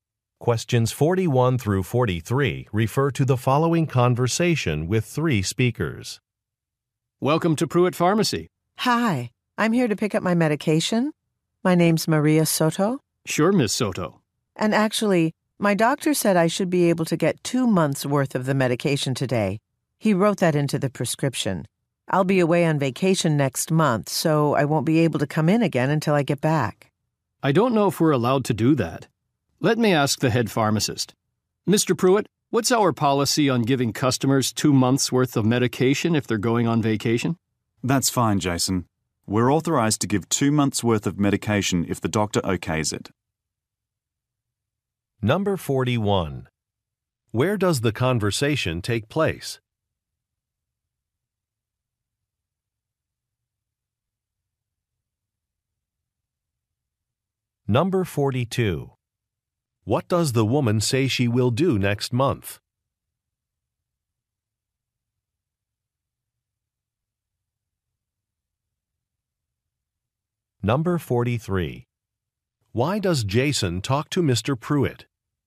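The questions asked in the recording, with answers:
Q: Where does the conversation take place?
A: At a pharmacy

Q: What does the woman say she will do next month?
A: Go on vacation

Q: Why does Jason talk to Mr. Pruitt?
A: To ask about a policy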